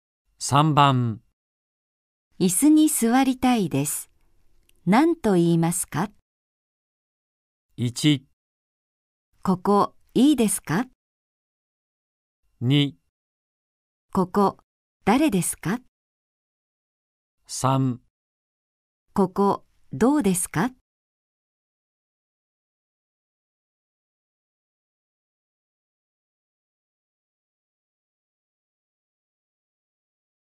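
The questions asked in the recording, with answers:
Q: 椅子に座りたいです。何と言いますか?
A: 1: ここいいですか?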